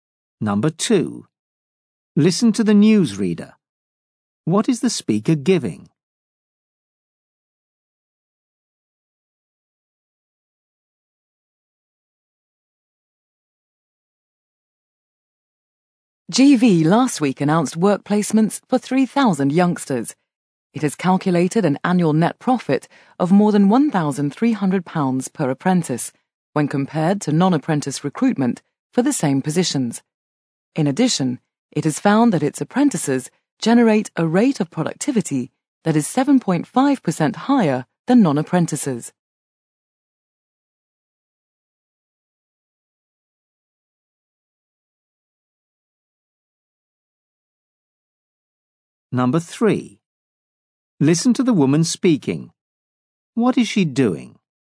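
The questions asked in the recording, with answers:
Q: What is the speaker giving?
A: Figures showing the financial benefits of apprentices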